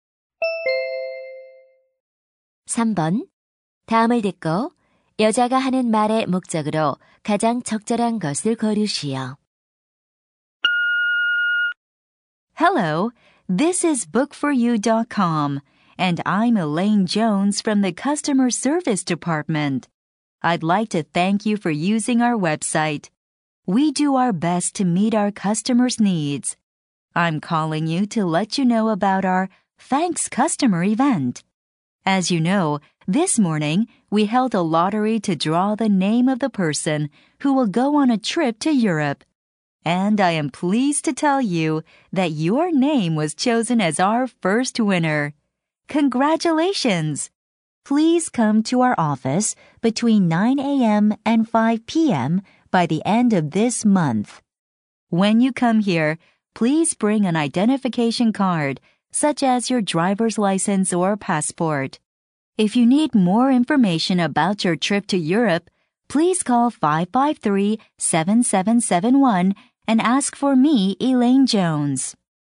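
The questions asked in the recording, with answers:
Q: 다음을 듣고 여자가 하는 말의 목적으로 가장 적절한 것을 고르시오.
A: 유럽 여행 경품 추첨 당첨 사실을 알리려고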